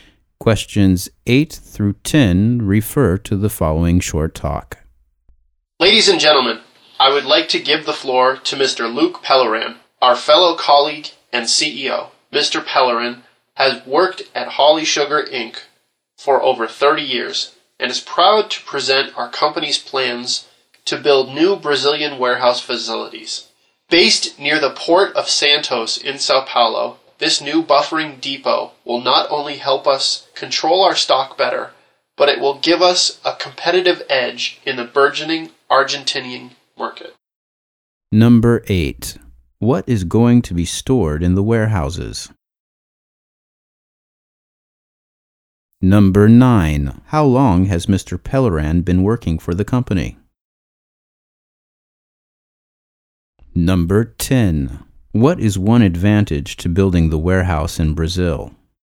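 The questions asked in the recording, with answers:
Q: How long has Mr. Pellerin been working for the company?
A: Over 30 years

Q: What is one advantage to building the warehouse in Brazil?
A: Better stock control and a competitive edge in the Argentinian market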